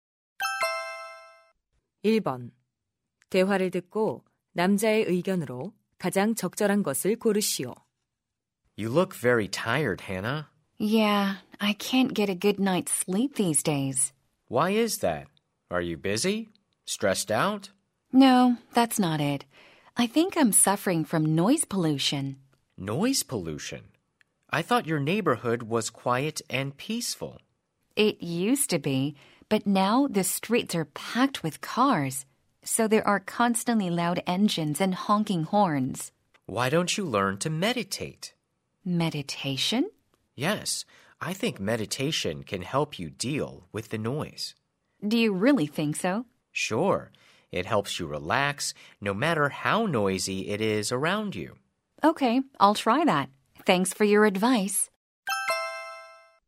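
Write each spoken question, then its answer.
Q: 대화를 듣고 남자의 의견으로 가장 적절한 것을 고르시오.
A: 명상은 소음에 대처하는 데 도움이 된다.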